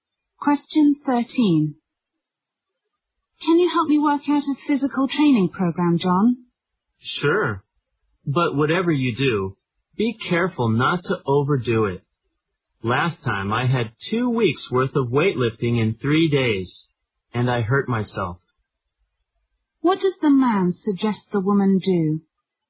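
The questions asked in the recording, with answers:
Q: What does the man suggest the woman do?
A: Be careful not to overdo her physical training.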